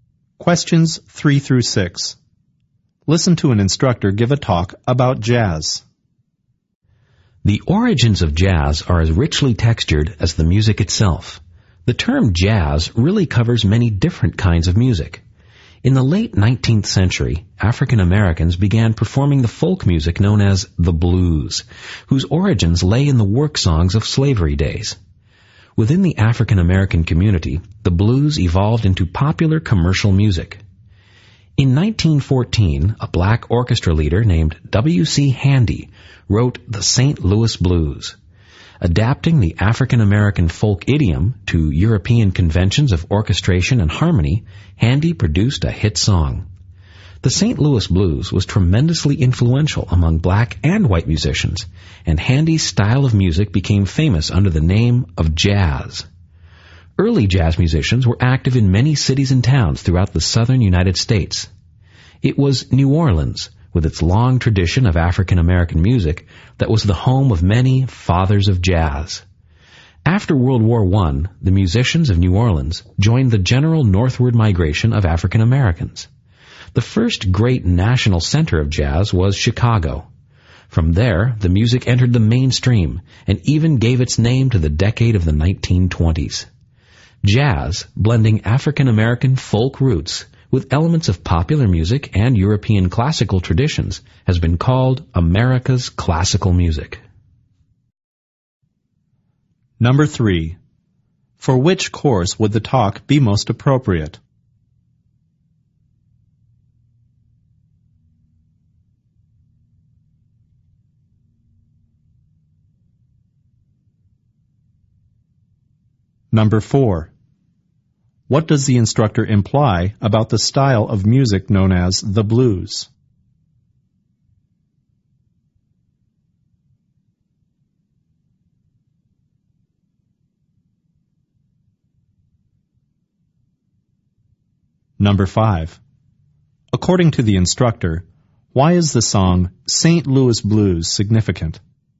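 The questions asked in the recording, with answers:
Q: What does the instructor imply about the style of music known as the blues?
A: It came from African American work songs of slavery days

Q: According to the instructor, why is the song St. Louis Blues significant?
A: It was very influential and made Handy's style famous as jazz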